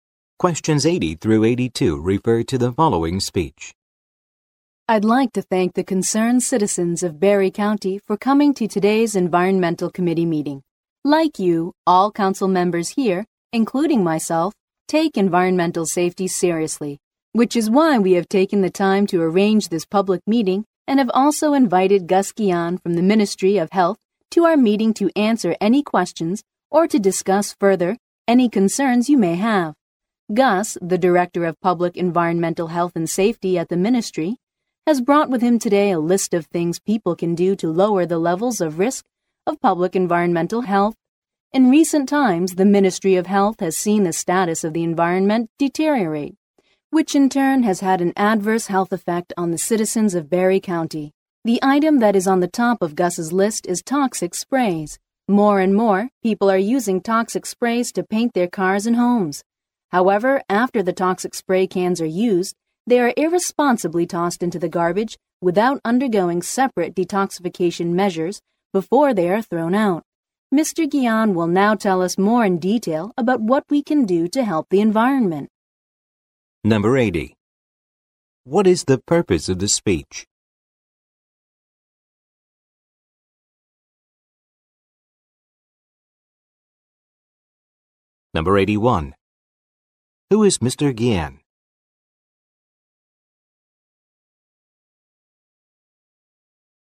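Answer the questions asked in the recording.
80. To open a public meeting on environmental safety and introduce a guest
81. Director of Public Environmental Health and Safety at the Ministry of Health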